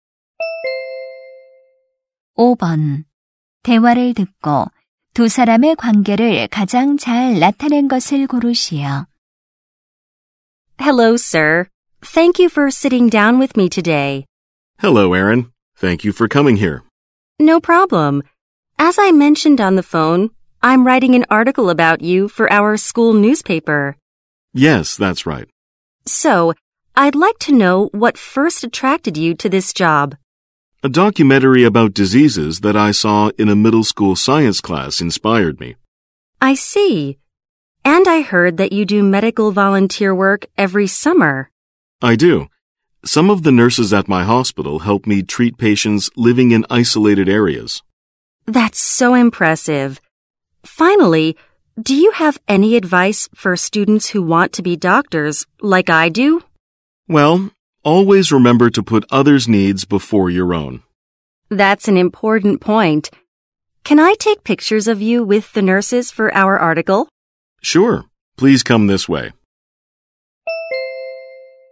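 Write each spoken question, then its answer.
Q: 대화를 듣고 두 사람의 관계를 가장 잘 나타낸 것을 고르시오.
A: 학교 신문 기자 - 의사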